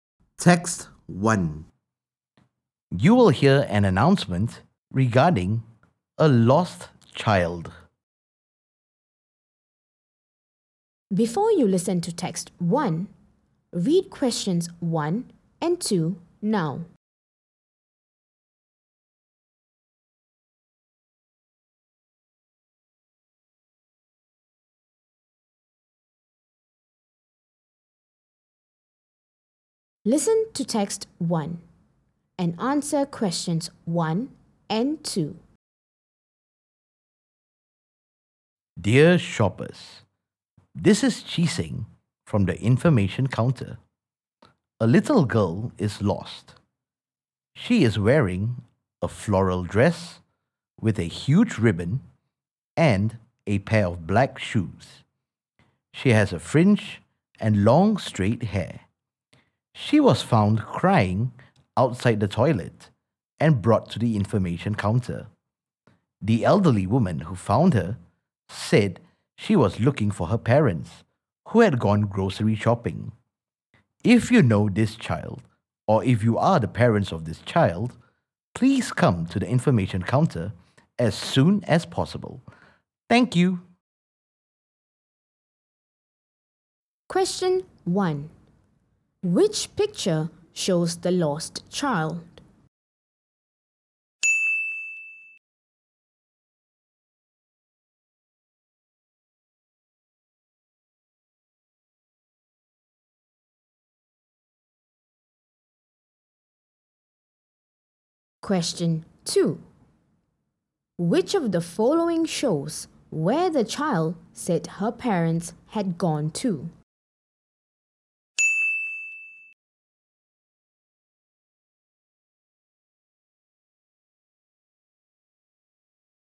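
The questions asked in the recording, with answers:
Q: Which of the following shows where the child said her parents had gone to?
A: grocery shopping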